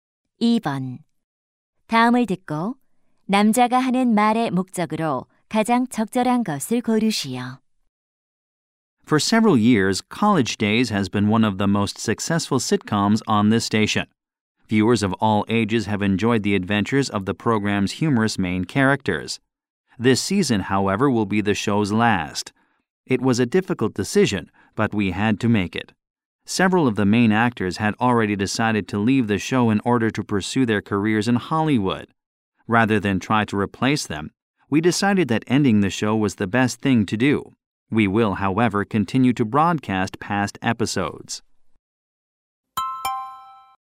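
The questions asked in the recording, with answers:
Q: 다음을 듣고 남자가 하는 말의 목적으로 가장 적절한 것을 고르시오.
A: 시트콤 College Days의 종영을 알리려고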